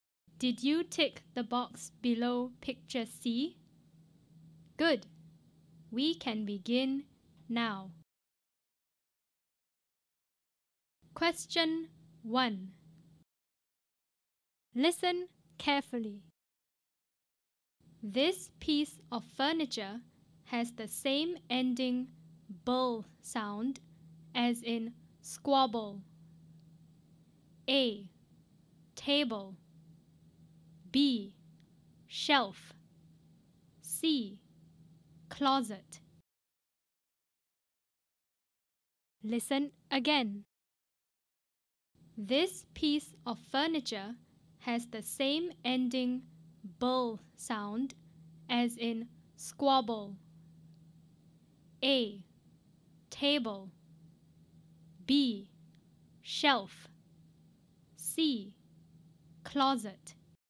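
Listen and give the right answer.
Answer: A: Table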